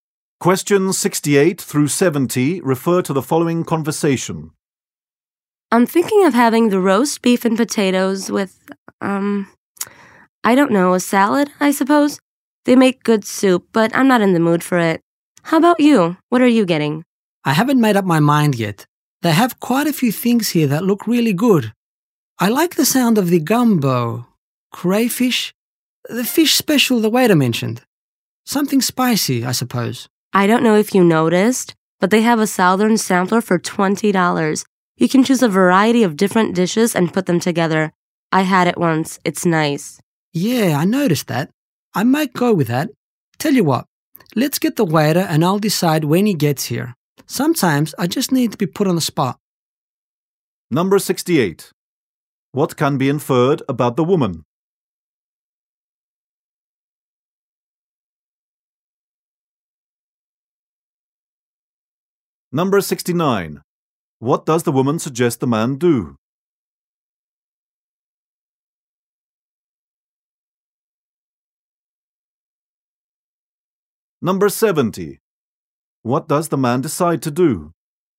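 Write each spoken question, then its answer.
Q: What does the woman suggest the man do?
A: Try the southern sampler

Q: What does the man decide to do?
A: Decide when the waiter comes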